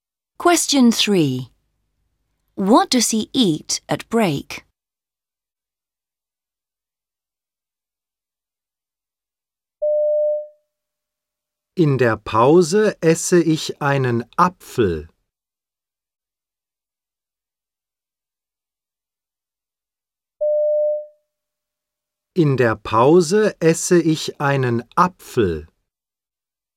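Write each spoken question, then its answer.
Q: What does he eat at break?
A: An apple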